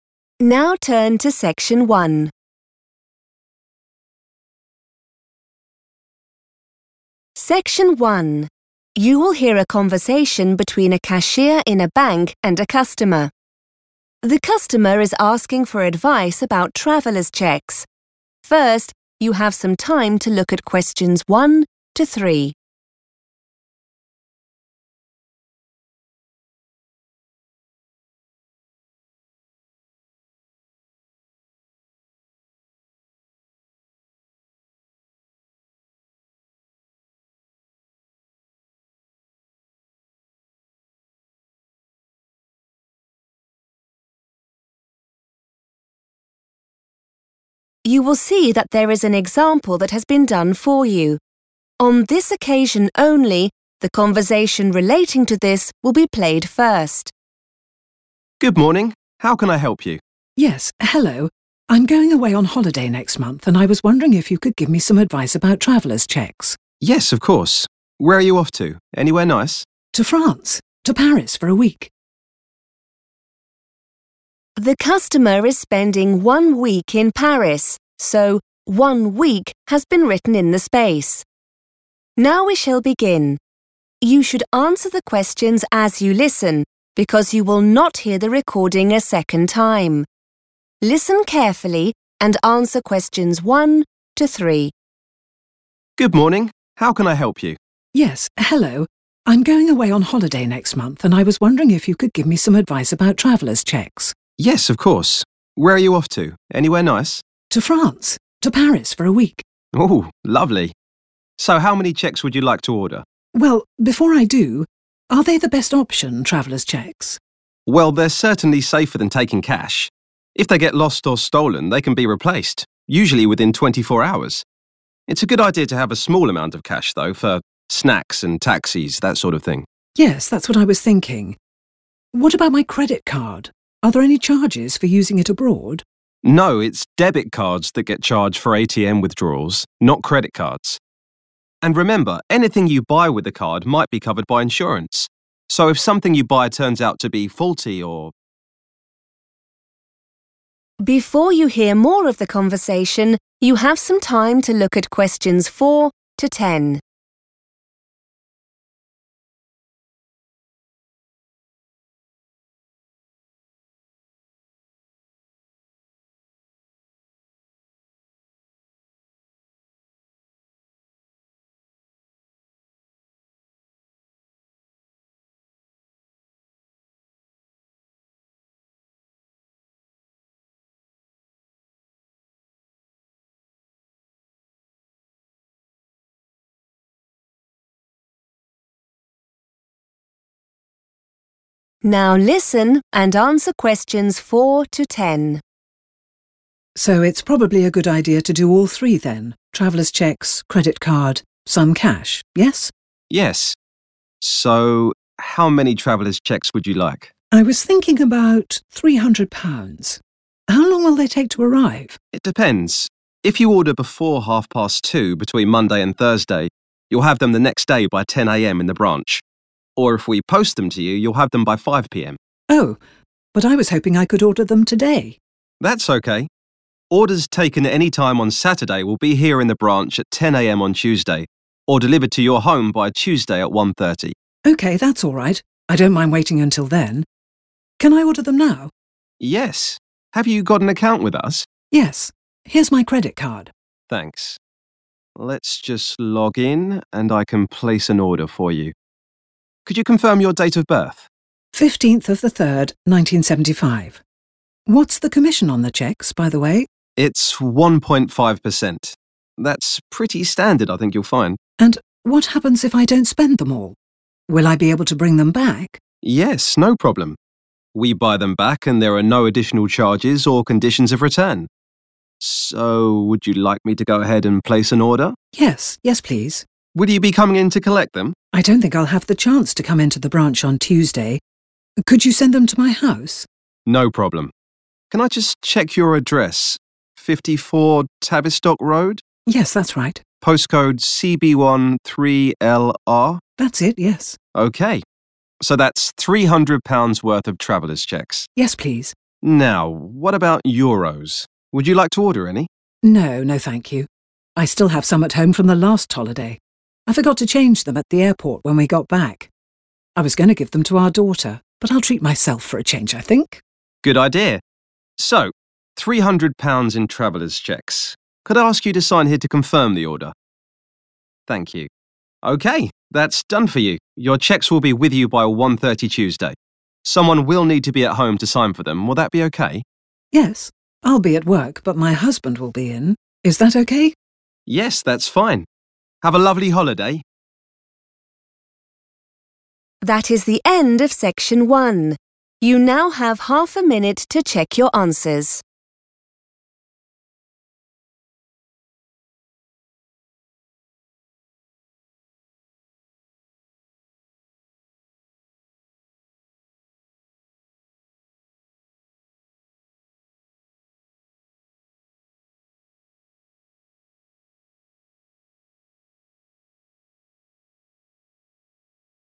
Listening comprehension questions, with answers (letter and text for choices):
Complete the notes below. Write NO MORE THAN THREE WORDS AND/OR A NUMBER for each answer.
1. Traveller's cheques can be replaced within _____ .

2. Having a little cash is useful for things like _____ .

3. The bank charges for ATM withdrawals with a _____ .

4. Before _____ p.m.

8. The bank will buy back unused traveller's cheques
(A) free of charge.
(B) for a small fee.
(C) if they are returned in good condition.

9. Sandra does not want Euros because she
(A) already has some.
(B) will be given some.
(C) will be buying some at the airport.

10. On Tuesday Sandra will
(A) collect the cheques from the branch.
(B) be at work.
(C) sign for the cheques at home.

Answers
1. 24 hours
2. snacks and taxis
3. debit card
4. 2.30 / 2:30
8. (A) free of charge.
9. (A) already has some.
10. (B) be at work.

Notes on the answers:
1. The correct answer is "24 hours" because the cashier explains that traveller's cheques are safer than cash. This is because if the cheques are lost or stolen, the bank can "replace" them (provide new ones) very quickly, and this usually happens in one day.
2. The correct answer is correct because the cashier suggests that Sandra should carry a small amount of cash in addition to her traveller's cheques. The cashier mentions snacks and taxis as specific examples of daily costs where cash is more convenient to use.
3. The correct answer is 'debit card' because the cashier explains that these specific cards have a fee (a charge) when you use them to take money out of a cash machine (ATM). This is different from credit cards, which the cashier says do not have these fees for that specific use.
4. The correct answer is 2.30 because the cashier explains that to receive the traveller's cheques the very next day, the order needs to be submitted before this time on any day from Monday to Thursday. This matches the table's requirement for a time limit (order before...) during the work week.
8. The correct answer is based on the cashier's explanation that there are 'no additional charges' for returning unused cheques. In English, when something has no charges or fees, it is considered 'free of charge'. Furthermore, the cashier mentions there are no 'conditions' for returning them, which means they don't have to be in a specific state or meet certain rules to be accepted back.
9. The correct answer is A because Sandra tells the cashier that she does not need to order any Euros. She says she still has money left over from a previous trip she took. This means she already possesses the currency she needs for her small expenses.
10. The correct answer is B because Sandra explicitly states her plans for Tuesday during the conversation. When the cashier explains that the traveller's cheques will be delivered to her home by 1:30 p.m. on Tuesday and requires a signature, Sandra clarifies that she will be at her job (at work). Because she is working, she also mentions that her husband will be the one at home to sign for the package instead of her. This also confirms she won't be going into the bank branch to collect them herself.

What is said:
Cashier: Good morning, how can I help you?
Sandra: Yes, hello. I'm going away on holiday next month and I was wondering if you could give me some advice about traveller's cheques.
Cashier: Yes, of course. Where are you off to? Anywhere nice?
Sandra: To France, to Paris for a week.
Cashier: Ooh, lovely! So how many cheques would you like to order?
Sandra: Well, before I do, are they the best option, traveller's cheques?
Cashier: Well, they're certainly safer than taking cash. If they get lost or stolen they can be replaced, usually within 24 hours. It's a good idea to have a small amount of cash though, for snacks and taxis, that sort of thing.
Sandra: Yes, that's what I was thinking. What about my credit card? Are there any charges for using it abroad?
Cashier: No, it's debit cards that get charged for ATM withdrawals not credit cards. And remember anything you buy with the card might be covered by insurance so if something you buy turns out to be faulty or –
Sandra: So it's probably a good idea to do all three then – traveller's cheques, credit card ... some cash, yes?
Sandra: I was thinking about £300. How long will they take to arrive?
Cashier: It depends. If you order before 2.30 between Monday and Thursday you'll have them the next day by 10.00 a.m. in the branch or if we post them to you, you'll have them by 5.00 p.m.
Sandra: Oh, but I was hoping I could order them today?
Cashier: That's okay. Orders taken anytime on Saturday will be here in the branch at 10.00 a.m. on Tuesday or delivered to your home by Tuesday at 1.30.
Sandra: Okay, that's alright. I don't mind waiting until then. Can I order them now?
Cashier: Yes. Have you got an account with us?
Sandra: Yes. Here's my credit card.
Cashier: Thanks. Let's just log in and I can place an order for you. Could you confirm your date of birth?
Sandra: 15th of the 3rd, 1975. What's the commission on the cheques, by the way?
Cashier: It's 1.5 per cent. That's pretty standard, I think you'll find.
Sandra: And what happens if I don't spend them all. Will I be able to bring them back?
Cashier: Yes, no problem. We buy them back and there are no additional charges or conditions of return. So would you like me to go ahead and place an order?
Sandra: Yes. Yes please.
Cashier: Will you be coming in to collect them?
Sandra: I don't think I'll have the chance to come into the branch on Tuesday. Could you send them to my house?
Cashier: No problem. Can I just check your address? 54 Tavistock Road?
Sandra: Yes, that's right.
Sandra: That's it, yes.
Cashier: Okay. So that's £300-worth of traveller's cheques.
Sandra: Yes please.
Cashier: Now what about Euros? Would you like to order any?
Sandra: No. No thank you. I still have some at home from the last holiday. I forgot to change them at the airport when we got back. I was going to give them to our daughter but I'll treat myself for a change I think.
Cashier: Good idea. So, £300 in traveller's cheques. Could I ask you to sign here to confirm the order? Thank you. Okay. Your cheques will be with you by 1.30 Tuesday. Someone will need to be at home to sign for them. Will that be okay?
Sandra: Yes. I'll be at work but my husband will be in. Is that okay?
Cashier: Yes, that's fine. Have a lovely holiday!